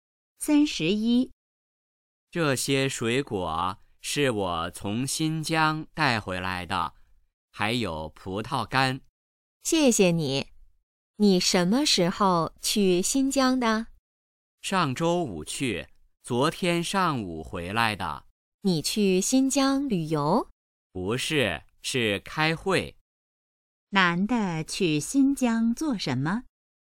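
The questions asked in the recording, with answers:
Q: 男的去新疆做什么?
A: 开会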